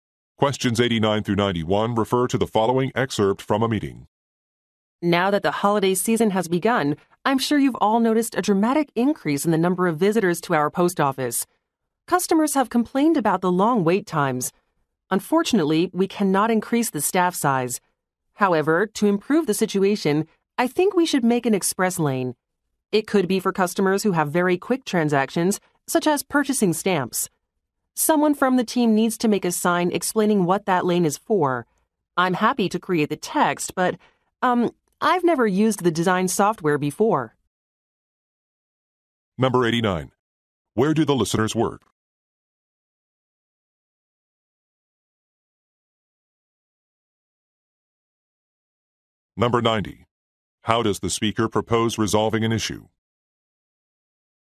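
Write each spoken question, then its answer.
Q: Where do the listeners work?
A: At a post office

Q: How does the speaker propose resolving an issue?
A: By creating an express lane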